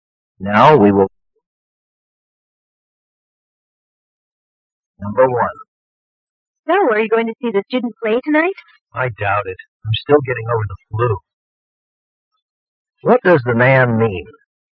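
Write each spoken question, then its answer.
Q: What does the man mean?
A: He probably won't go to the play because he is still recovering from the flu.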